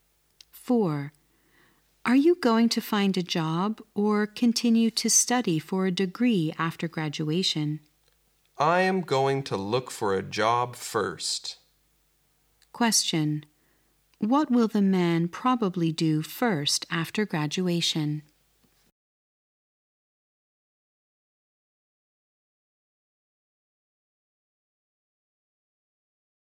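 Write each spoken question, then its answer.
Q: Question. What will the man probably do first after graduation?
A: Look for a job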